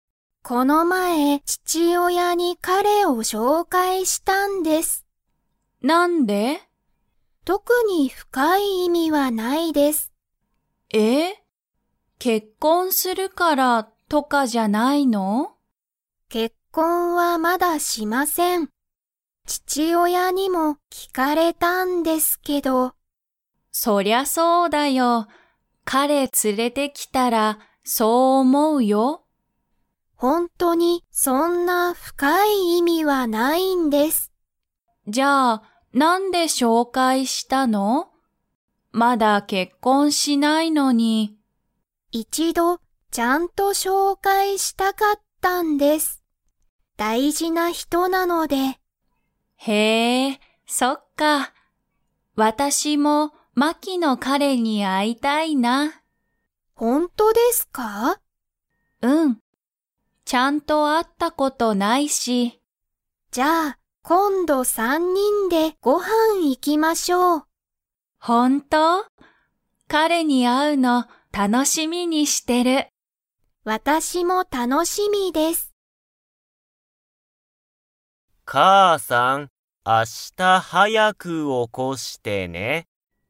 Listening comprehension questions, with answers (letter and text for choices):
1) マキは、彼かれとすぐに結婚けっこんしますか?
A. はい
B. いいえ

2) 今度こんど、どの3さん人にんがご飯はんに行いきますか?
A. マキ、アヤ、マキの父親ちちおや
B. マキ、アヤ、マキの彼かれ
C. マキ、マキの父親ちちおや、マキの彼かれ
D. マキ、アヤ、アヤの彼かれ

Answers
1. B. いいえ
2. B. マキ、アヤ、マキの彼かれ

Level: Level 3